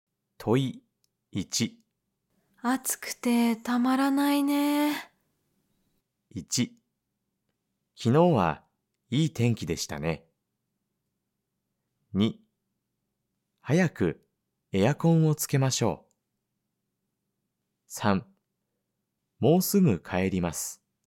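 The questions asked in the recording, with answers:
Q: 暑くてたまらないね。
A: 2: 早くエアコンをつけましょう。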